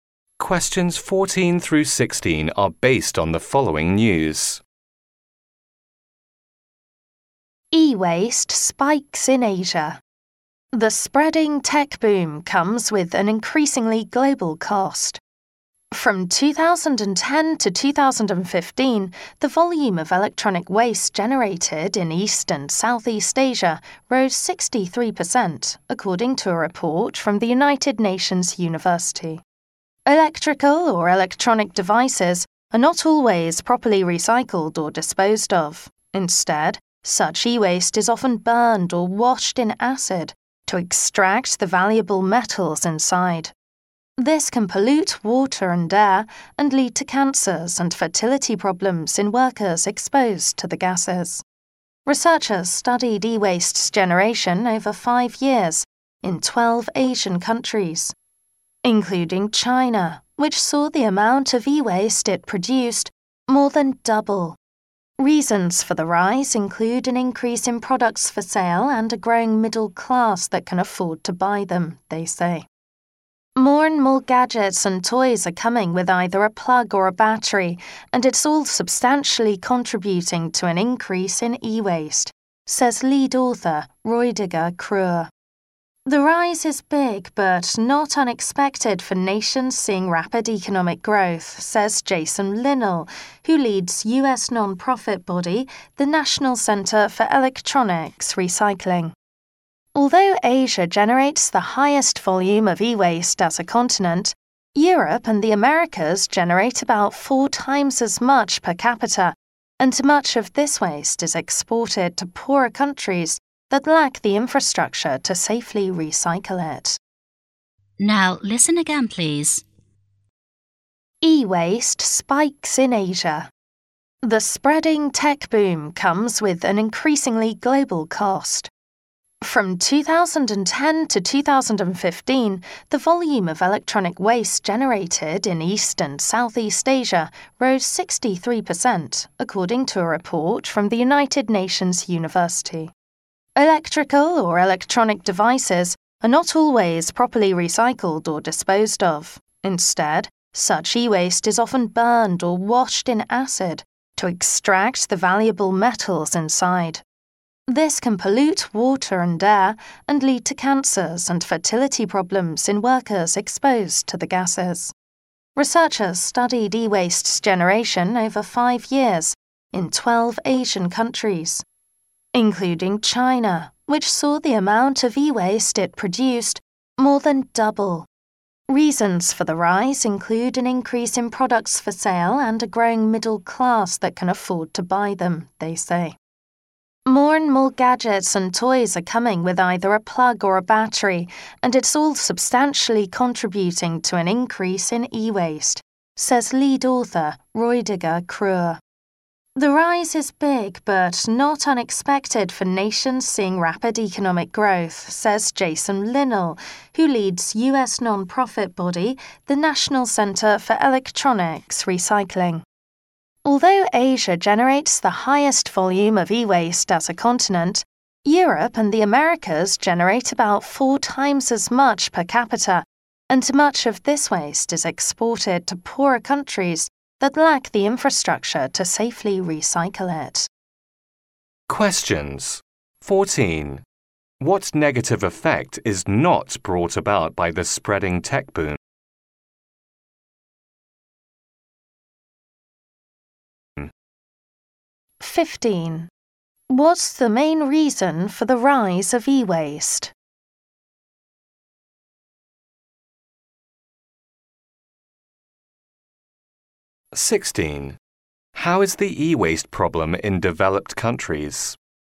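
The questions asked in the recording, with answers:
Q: What's the main reason for the rise of e-waste?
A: More products for sale and a growing middle class that can afford them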